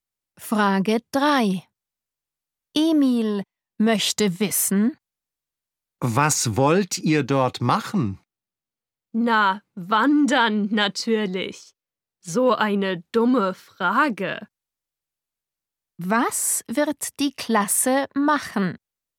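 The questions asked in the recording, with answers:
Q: Was wird die Klasse machen?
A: Wandern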